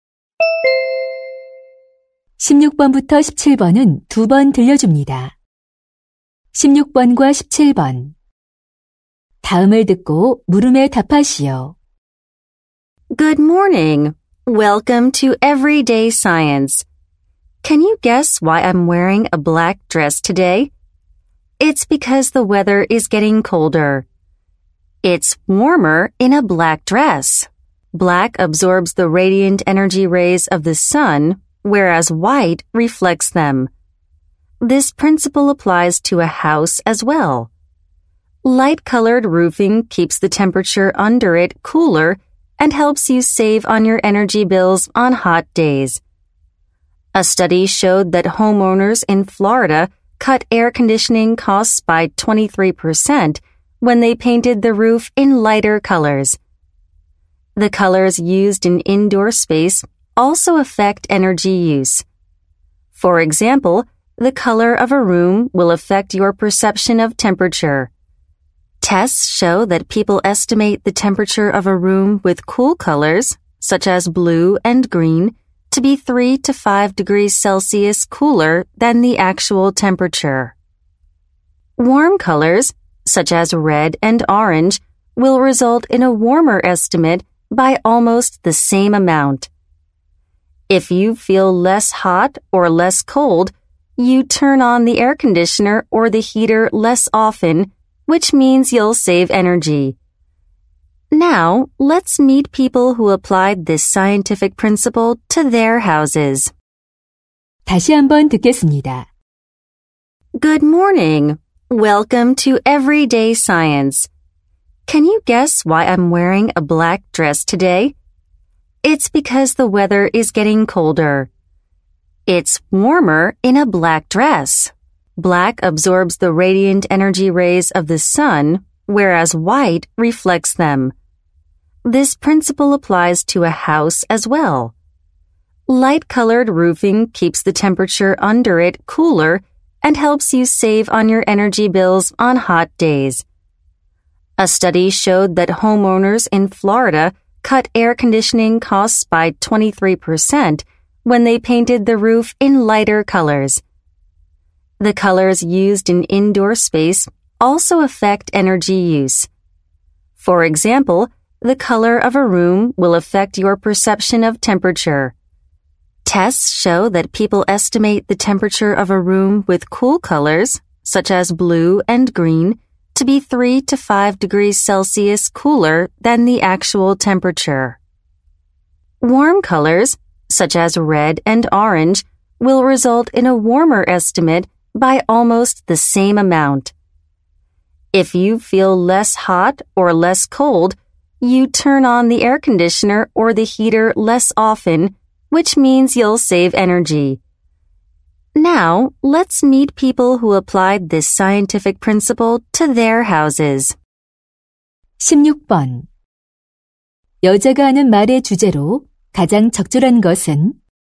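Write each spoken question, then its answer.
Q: 여자가 하는 말의 주제로 가장 적절한 것은?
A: 색상이 에너지 사용에 미치는 영향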